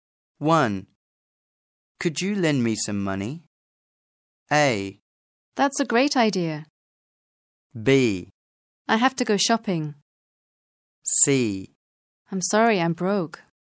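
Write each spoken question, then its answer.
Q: Could you lend me some money?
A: C: I'm sorry, I'm broke.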